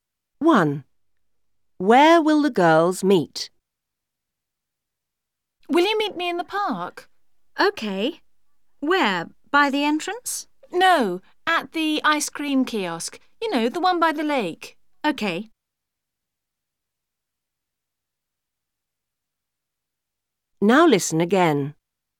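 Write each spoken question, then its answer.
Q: Where will the girls meet?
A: At the ice cream kiosk by the lake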